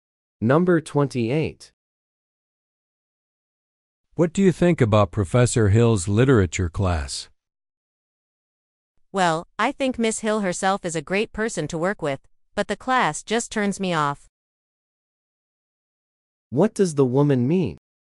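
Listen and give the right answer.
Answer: She likes the professor but not the class.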